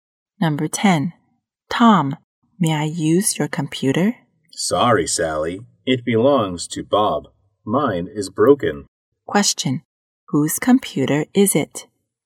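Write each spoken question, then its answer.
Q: Whose computer is it?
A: Bob's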